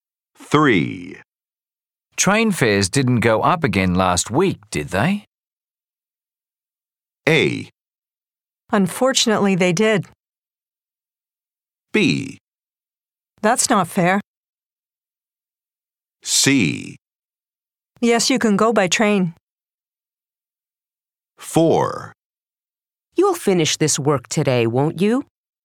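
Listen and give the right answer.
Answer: A: Unfortunately, they did.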